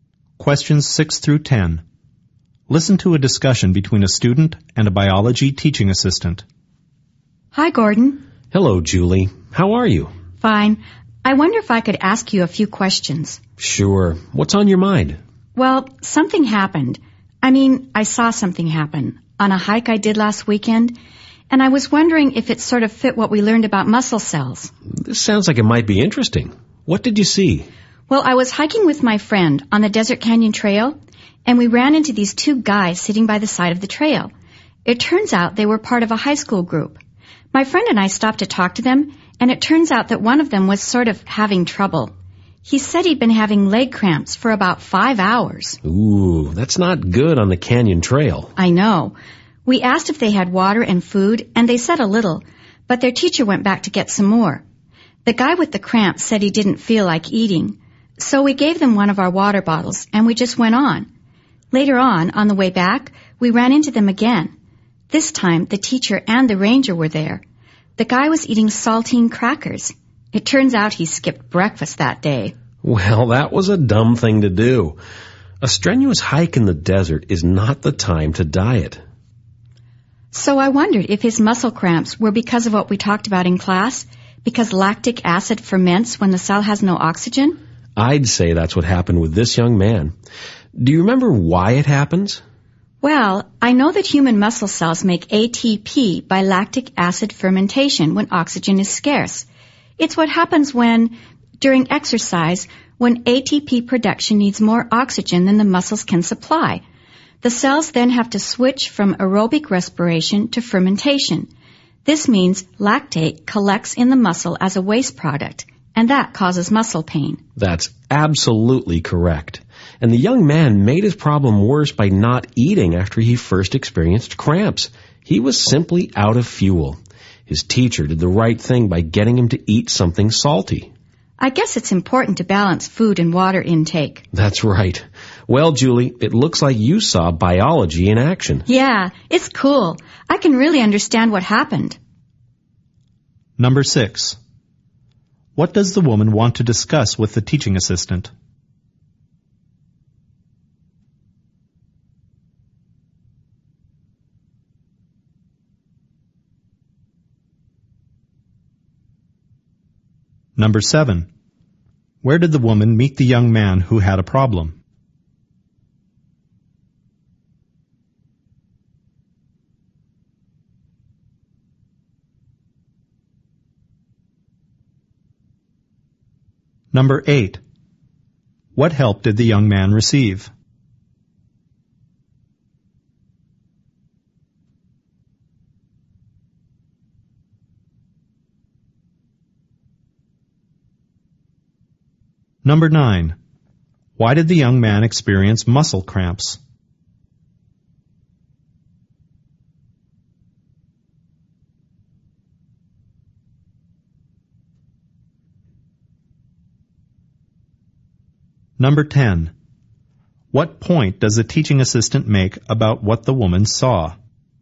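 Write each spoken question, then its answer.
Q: What does the woman want to discuss with the teaching assistant?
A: Whether leg cramps she saw on a hike fit what they learned about muscle cells

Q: Where did the woman meet the young man who had a problem?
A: On the Desert Canyon Trail

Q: What help did the young man receive?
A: Water, and saltine crackers to eat

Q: Why did the young man experience muscle cramps?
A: Lactate built up from fermentation when his muscles lacked oxygen, and he had skipped breakfast

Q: What point does the teaching assistant make about what the woman saw?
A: She saw biology in action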